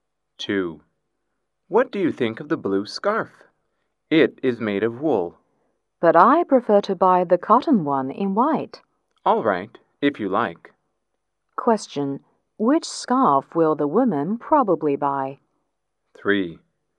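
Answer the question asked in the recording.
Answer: The white cotton one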